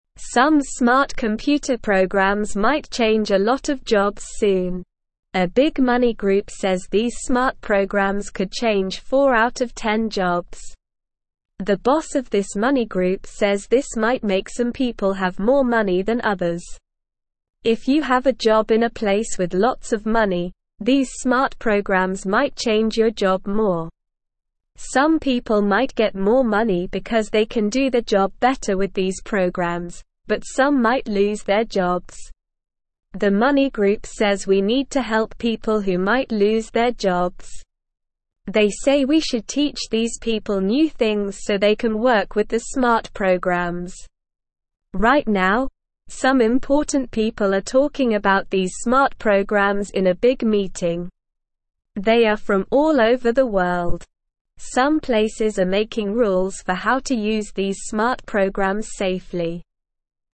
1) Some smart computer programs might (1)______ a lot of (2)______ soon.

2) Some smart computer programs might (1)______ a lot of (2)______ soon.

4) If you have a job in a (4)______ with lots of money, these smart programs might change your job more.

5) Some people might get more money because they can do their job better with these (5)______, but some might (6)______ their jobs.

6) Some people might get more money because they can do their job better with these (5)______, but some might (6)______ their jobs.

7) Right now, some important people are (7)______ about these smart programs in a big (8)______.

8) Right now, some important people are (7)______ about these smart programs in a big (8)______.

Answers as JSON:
{"1": "change", "2": "jobs", "4": "place", "5": "programs", "6": "lose", "7": "talking", "8": "meeting"}

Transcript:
Some smart computer programs might change a lot of jobs soon. A big money group says these smart programs could change 4 out of 10 jobs. The boss of this money group says this might make some people have more money than others. If you have a job in a place with lots of money, these smart programs might change your job more. Some people might get more money because they can do their job better with these programs, but some might lose their jobs.
The money group says we need to help people who might lose their jobs. They say we should teach these people new things so they can work with the smart programs. Right now, some important people are talking about these smart programs in a big meeting. They are from all over the world. Some places are making rules for how to use these smart programs safely.

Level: Level 1